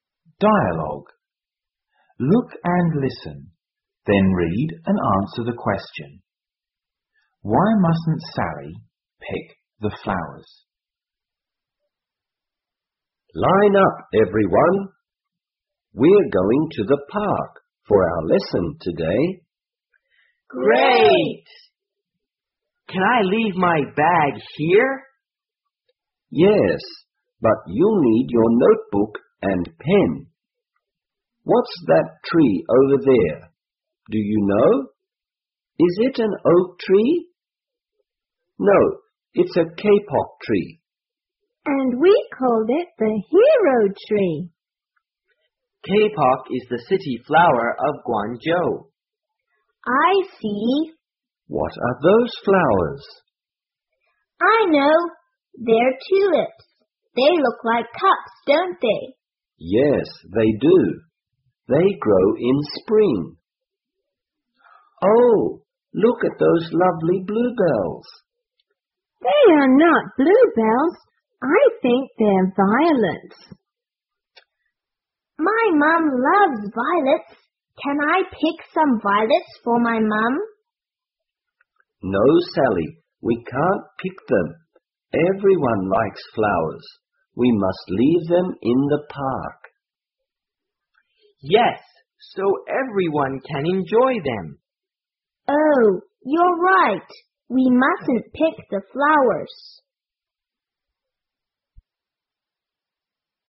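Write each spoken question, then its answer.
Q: Why mustn't Sally pick the flowers?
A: Because they must leave them in the park so everyone can enjoy them.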